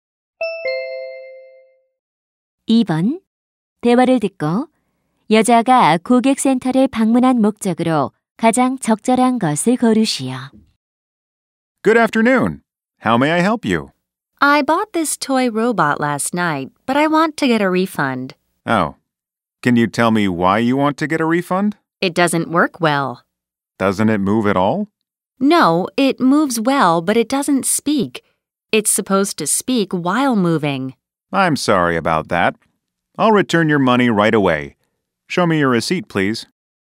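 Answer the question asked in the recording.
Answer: 장난감 로봇을 환불받기 위해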